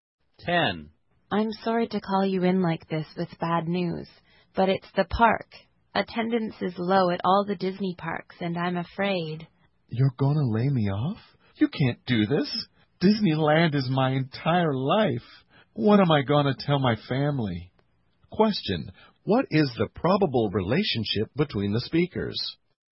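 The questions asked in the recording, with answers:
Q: what is the probable relationship between the speakers?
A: Employer and employee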